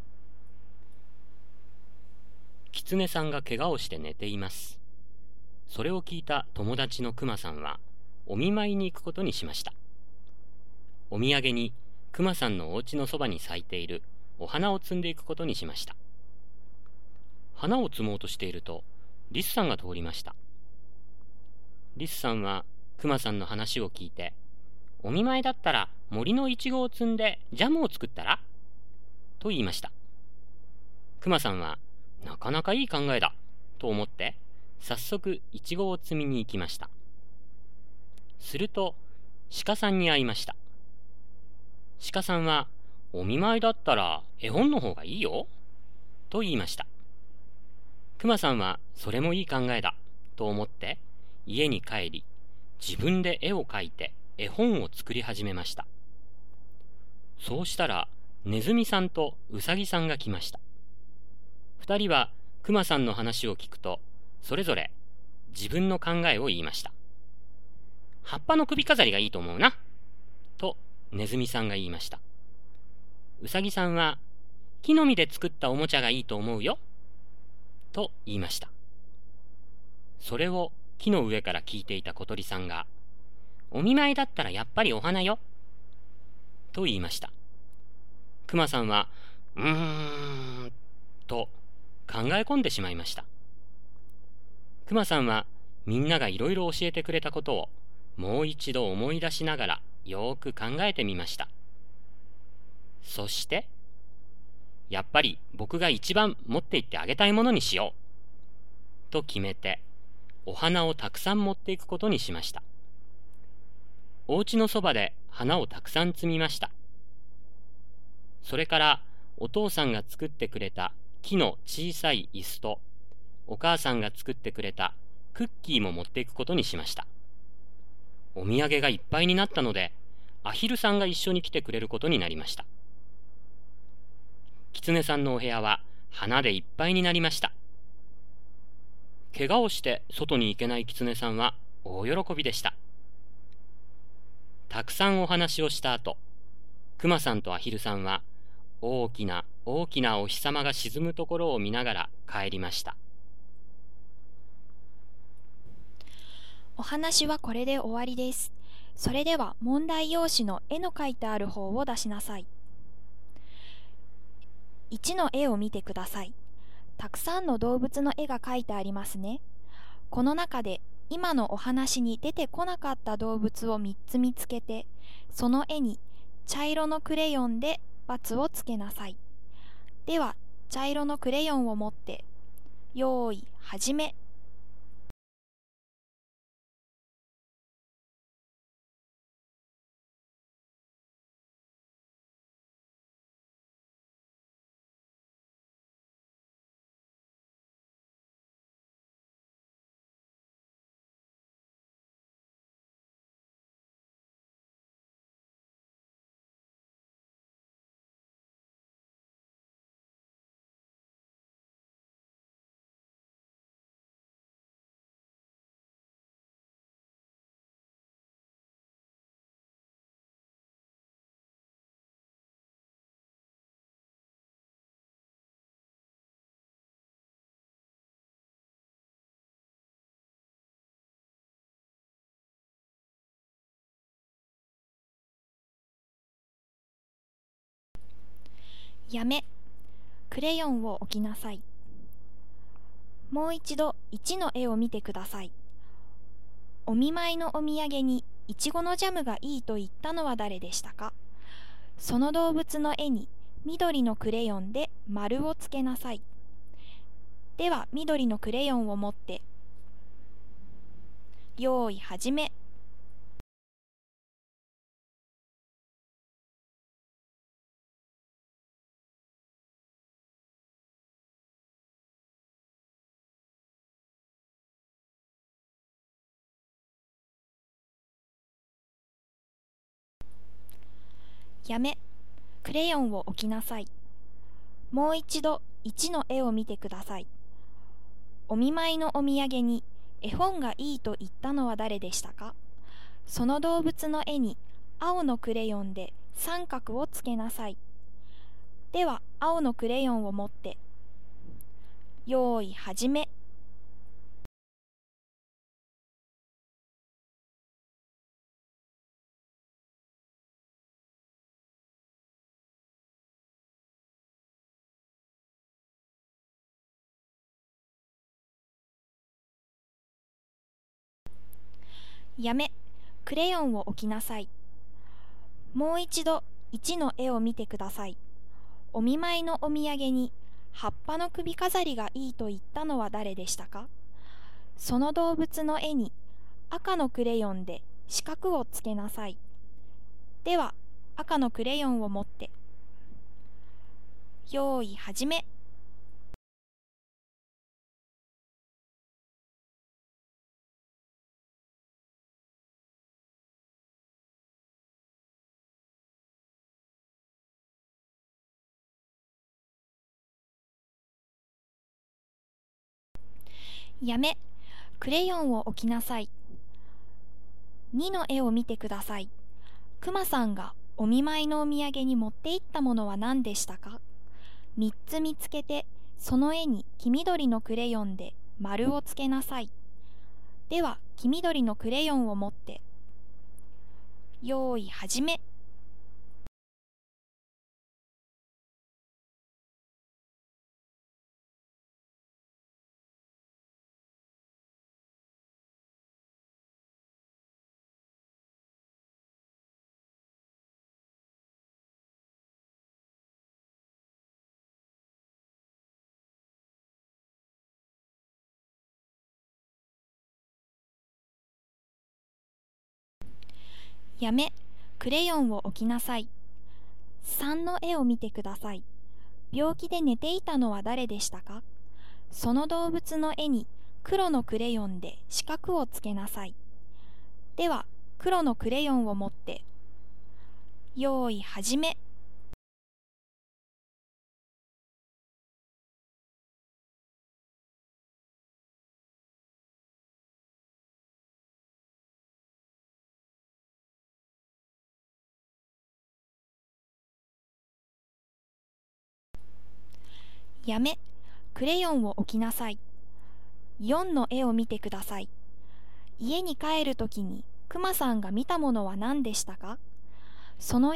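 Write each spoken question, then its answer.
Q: お見舞いのお土産にイチゴのジャムがいいと言ったのは誰でしたか。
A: リスさん

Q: お見舞いのお土産に絵本がいいと言ったのは誰でしたか?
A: 鹿さん

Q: お見舞いのお土産に葉っぱの首飾りがいいと言ったのは誰でしたか?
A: ネズミさん

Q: クマさんがお見舞いのお土産に持って行ったものは何でしたか?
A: お花、木の小さい椅子、クッキー

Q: 病気で寝ていたのは誰でしたか?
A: キツネさん

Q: 家に帰るときにクマさんが見たものは何でしたか?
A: 沈むお日様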